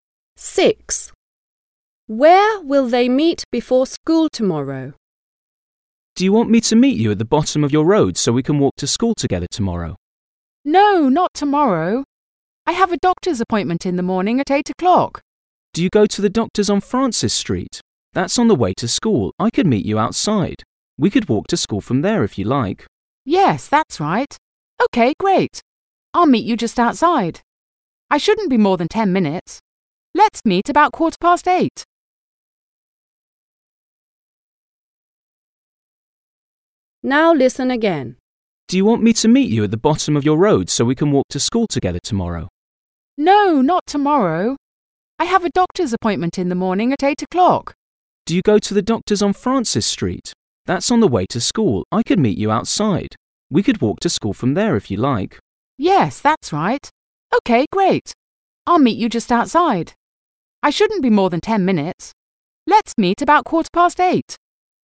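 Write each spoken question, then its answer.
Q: Where will they meet before school tomorrow?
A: outside the doctor's on Francis Street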